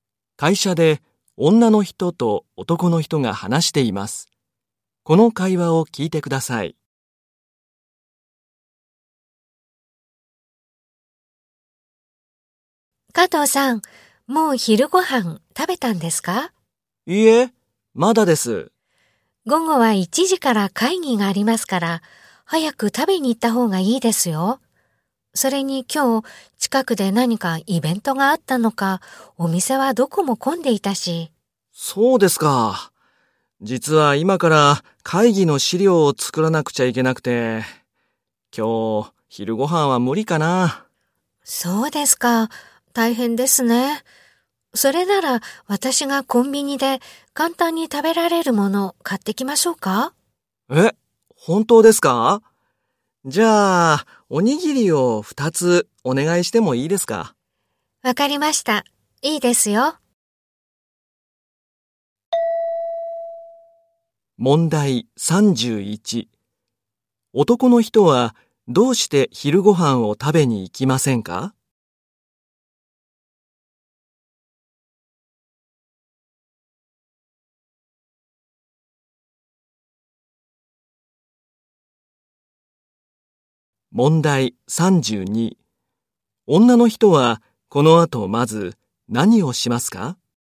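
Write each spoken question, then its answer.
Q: 男の人はどうして昼ご飯を食べに行きませんか?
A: 会議の資料を作らなくてはいけないから

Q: 女の人はこの後まず何をしますか?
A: コンビニへおにぎりを買いに行く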